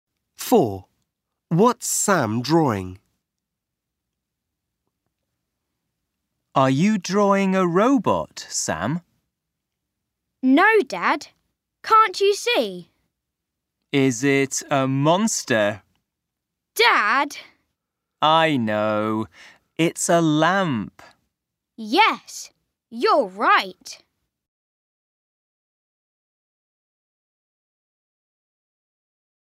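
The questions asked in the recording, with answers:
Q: What's Sam drawing?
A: a lamp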